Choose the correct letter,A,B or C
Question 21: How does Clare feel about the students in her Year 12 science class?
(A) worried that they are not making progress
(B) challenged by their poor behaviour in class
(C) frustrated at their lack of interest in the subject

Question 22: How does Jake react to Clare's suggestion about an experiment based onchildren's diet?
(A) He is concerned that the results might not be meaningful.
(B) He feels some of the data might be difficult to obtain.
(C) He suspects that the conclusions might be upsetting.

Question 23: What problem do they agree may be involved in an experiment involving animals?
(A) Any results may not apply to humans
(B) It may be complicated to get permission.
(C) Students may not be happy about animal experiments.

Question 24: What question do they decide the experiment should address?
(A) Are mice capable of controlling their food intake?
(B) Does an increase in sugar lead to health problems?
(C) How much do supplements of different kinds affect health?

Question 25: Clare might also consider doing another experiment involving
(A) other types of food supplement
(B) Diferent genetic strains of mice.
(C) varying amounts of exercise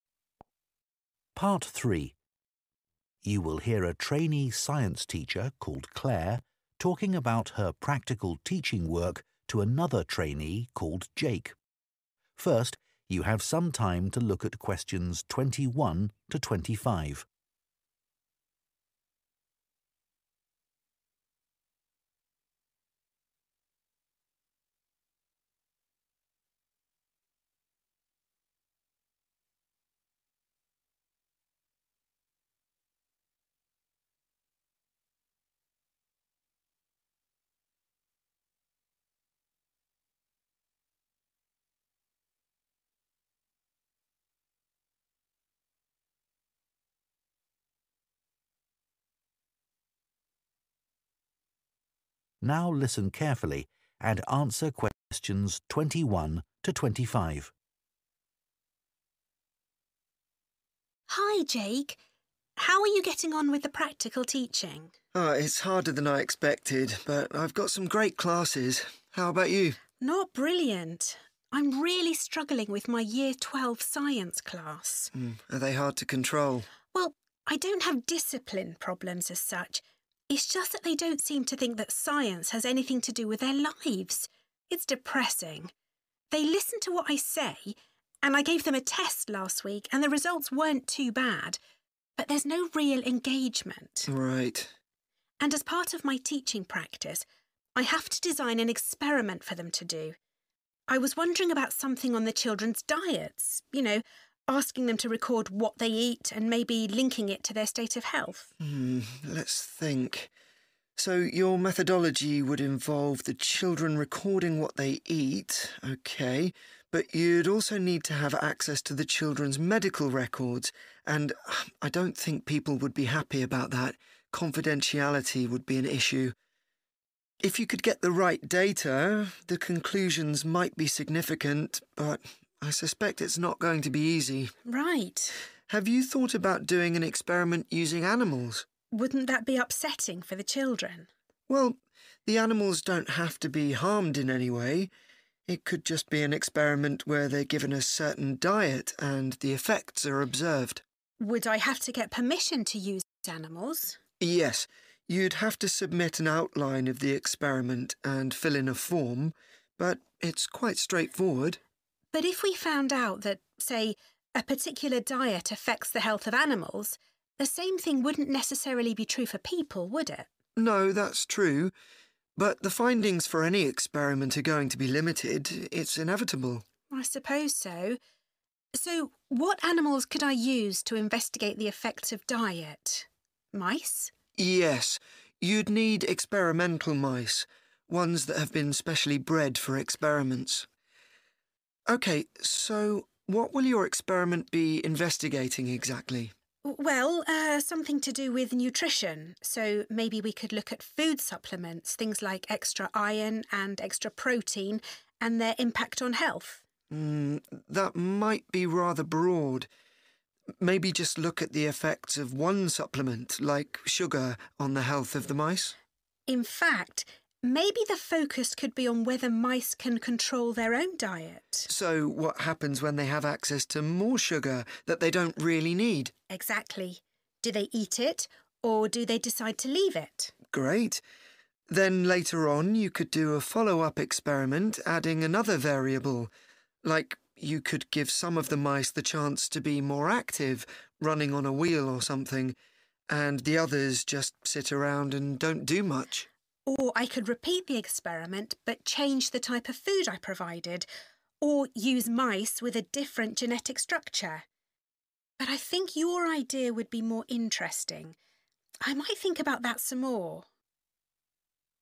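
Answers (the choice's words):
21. frustrated at their lack of interest in the subject
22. He feels some of the data might be difficult to obtain.
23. Any results may not apply to humans
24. Are mice capable of controlling their food intake?
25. varying amounts of exercise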